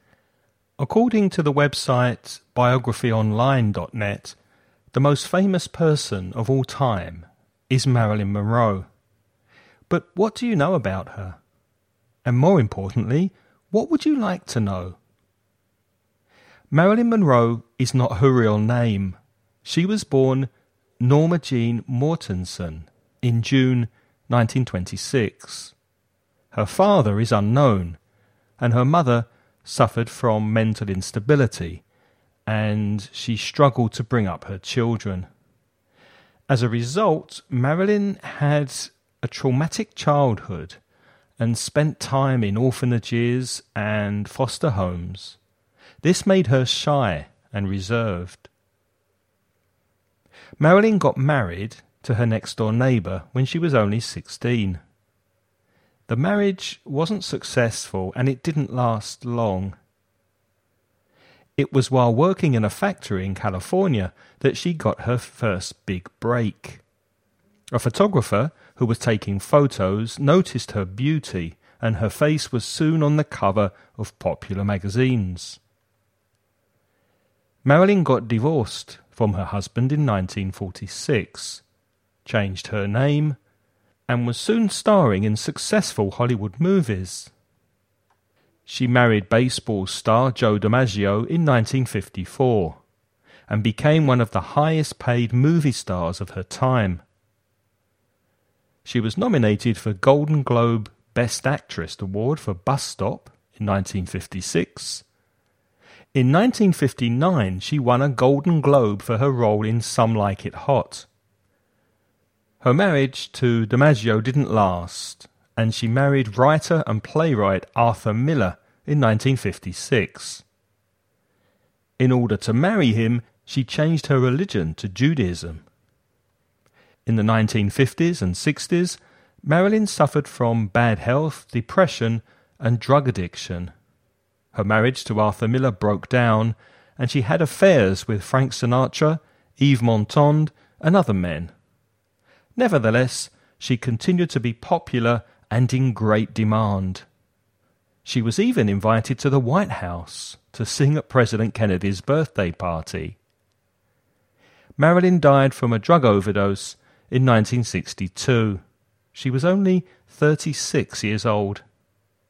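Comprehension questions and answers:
Listen and write the questions you hear.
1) When was Marilyn Monroe born?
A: In June 1926

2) Who did she marry when she was 16?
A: Her next-door neighbour

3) What two things did Marilyn do in 1946?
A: She got divorced and changed her name

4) What's the name of the film that she won a Golden Globe award for in 1959?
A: Some Like It Hot

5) How many times did Marilyn Monroe get married?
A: Three times

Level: nivel intermedio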